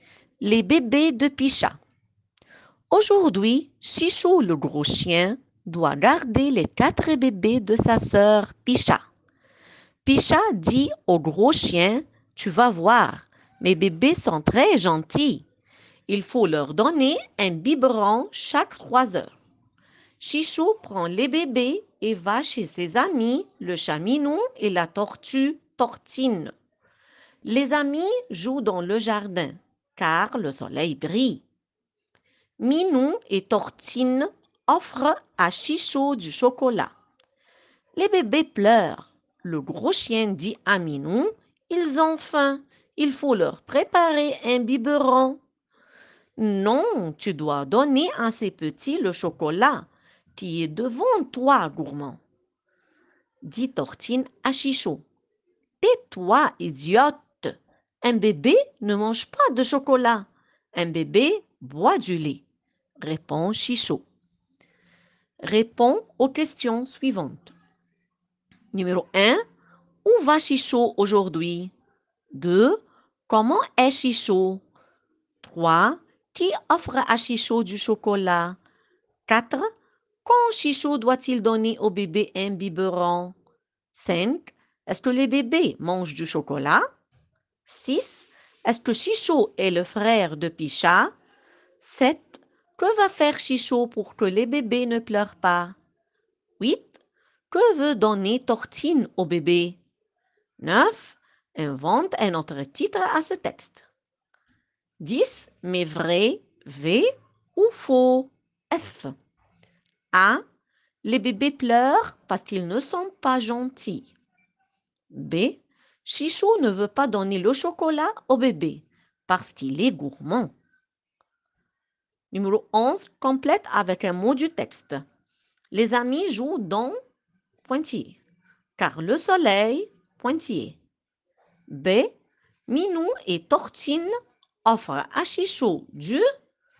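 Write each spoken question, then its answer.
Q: Où va Chichou aujourd'hui?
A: Chez ses amis, le chat Minou et la tortue Tortine

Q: Comment est Chichou?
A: Gros

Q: Qui offre à Chichou du chocolat?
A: Minou et Tortine

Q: Quand Chichou doit-il donner au bébé un biberon?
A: Toutes les 3 heures

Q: Est-ce que les bébés mangent du chocolat?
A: Non, ils boivent du lait

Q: Est-ce que Chichou est le frère de Picha?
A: Oui

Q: Que va faire Chichou pour que les bébés ne pleurent pas?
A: Leur préparer un biberon

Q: Les bébés pleurent parce qu'ils ne sont pas gentils.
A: Faux

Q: Chichou ne veut pas donner le chocolat au bébé parce qu'il est gourmand.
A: Faux

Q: Les amis jouent dans pointillé.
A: le jardin

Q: Car le soleil pointillé.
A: brille

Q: Minou et Tortine offrent à Chichou du pointillé.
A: chocolat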